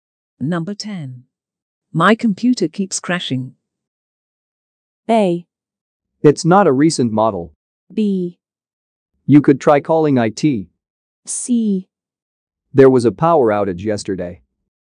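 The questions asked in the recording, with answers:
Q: My computer keeps crashing.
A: B: You could try calling IT.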